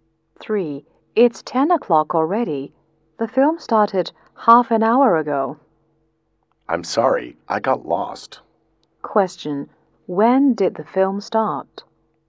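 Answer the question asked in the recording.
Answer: At 9:30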